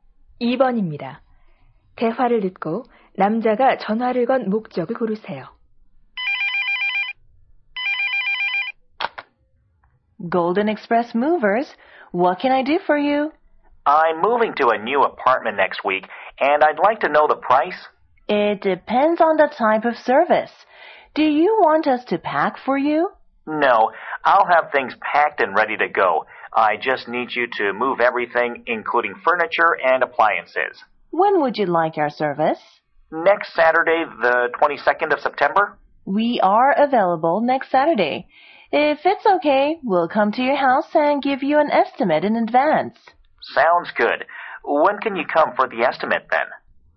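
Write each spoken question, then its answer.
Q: 대화를 듣고 남자가 전화를 건 목적을 고르세요.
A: 이사 비용을 문의하려고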